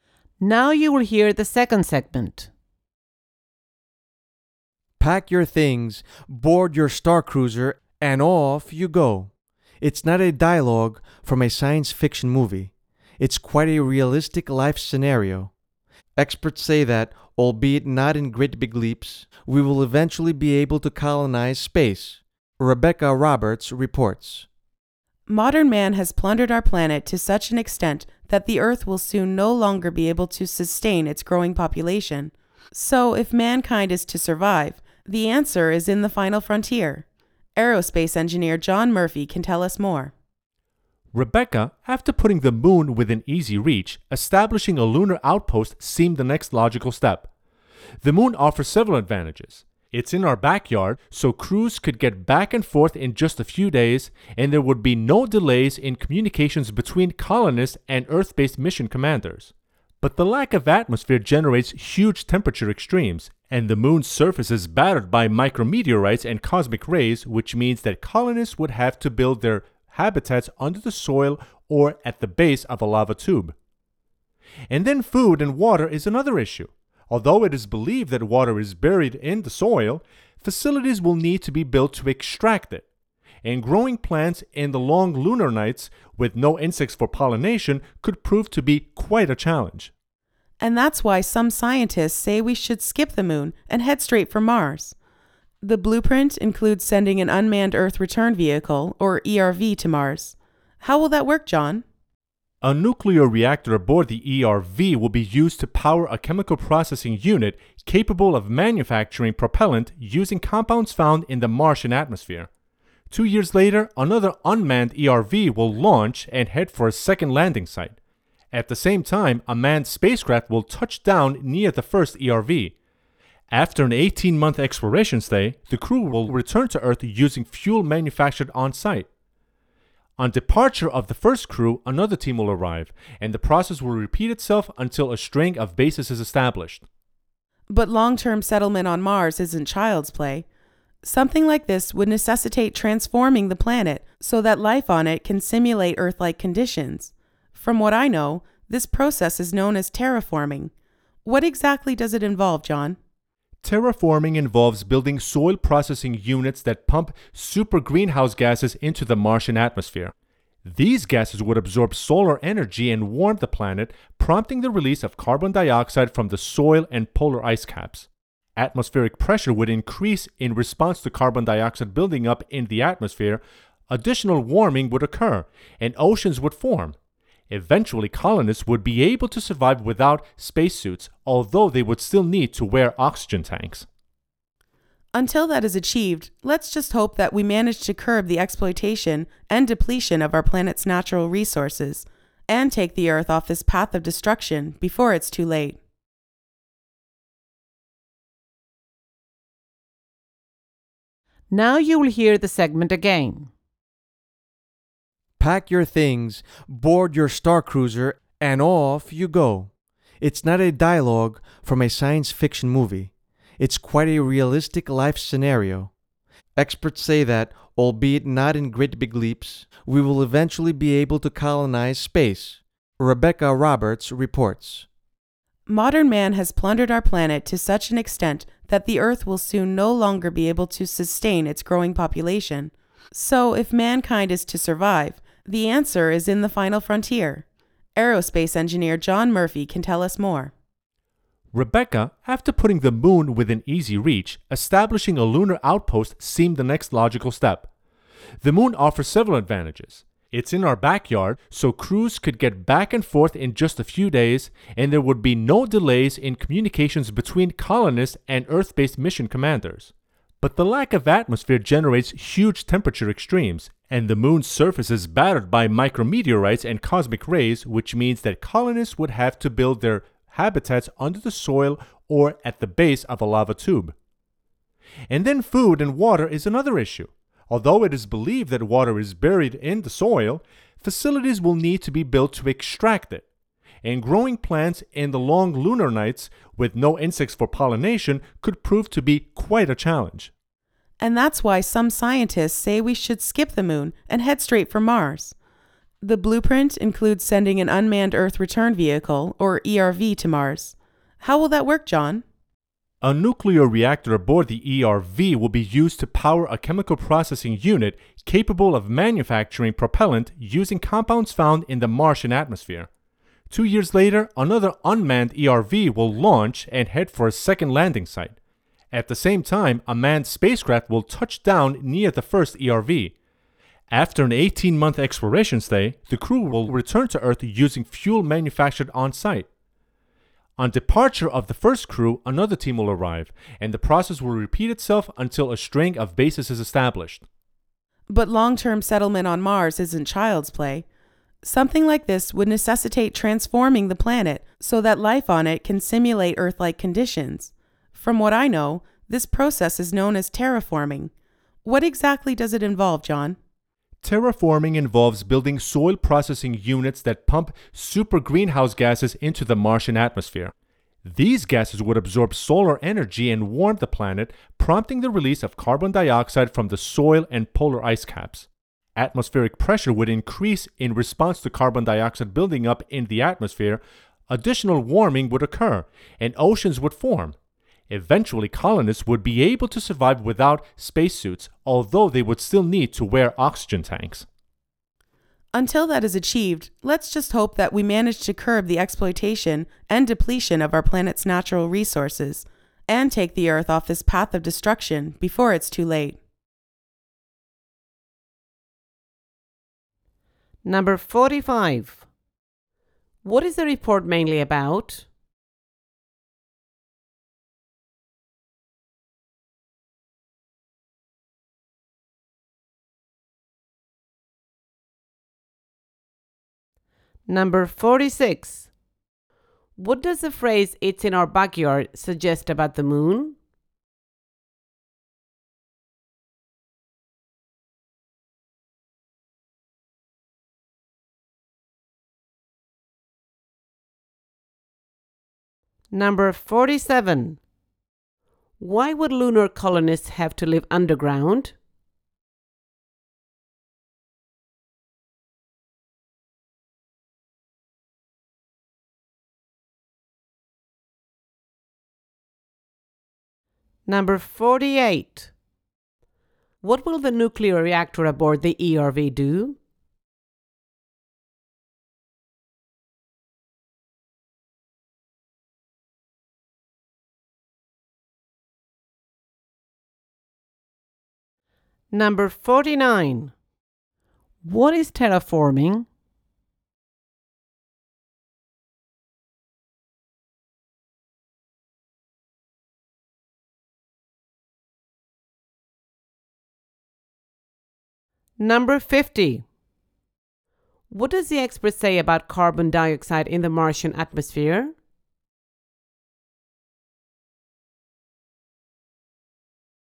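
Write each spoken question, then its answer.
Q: What is the report mainly about?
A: Colonizing space (the moon and Mars)

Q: What does the phrase "it's in our backyard" suggest about the moon?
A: It is close to Earth

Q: Why would lunar colonists have to live underground?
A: For protection from temperature extremes, micrometeorites and cosmic rays

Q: What will the nuclear reactor aboard the ERV do?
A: Power a unit that makes propellant from the Martian atmosphere

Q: What is terraforming?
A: Transforming a planet to have Earth-like conditions

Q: What does the expert say about carbon dioxide in the Martian atmosphere?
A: Its buildup would increase atmospheric pressure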